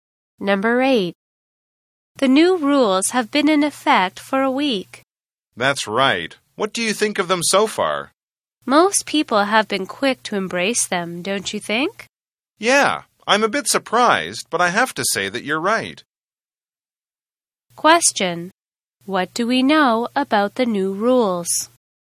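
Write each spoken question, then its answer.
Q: What do we know about the new rules?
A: Most people have been quick to embrace them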